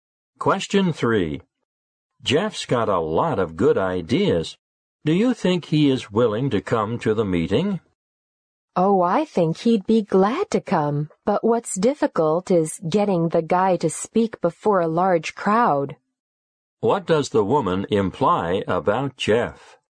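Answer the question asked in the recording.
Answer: He finds it hard to speak before a large crowd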